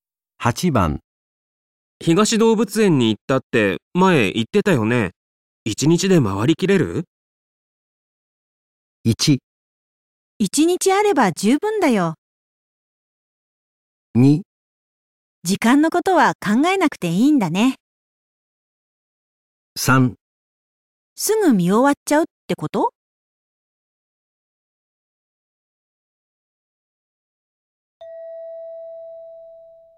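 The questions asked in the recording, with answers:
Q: 東動物園に行ったって前言ってたよね。一日で回りきれる?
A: 1: 一日あれば十分だよ。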